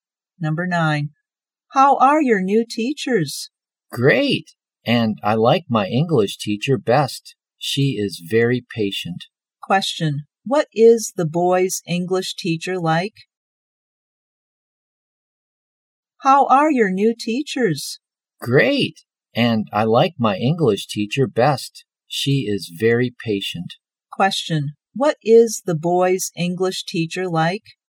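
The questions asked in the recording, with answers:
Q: Question. What is the boy's English teacher like?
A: Very patient.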